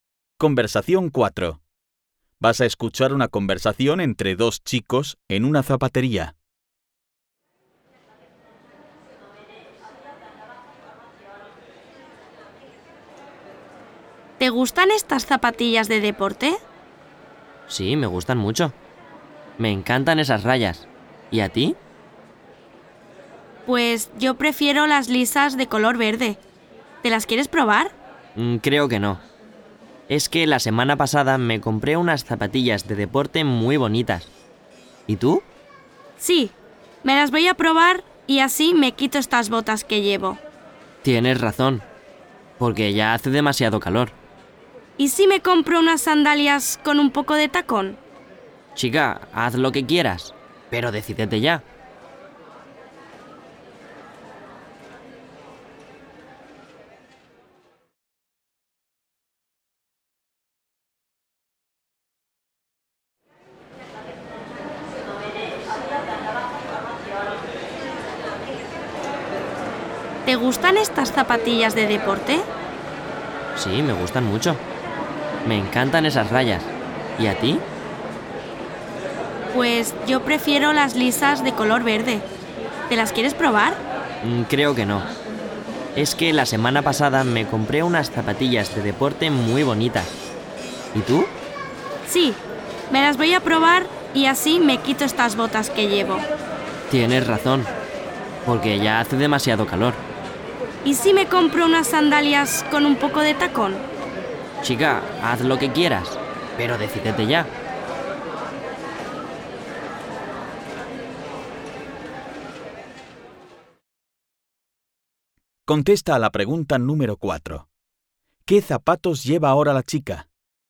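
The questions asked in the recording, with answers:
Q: ¿Qué zapatos lleva ahora la chica?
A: Botas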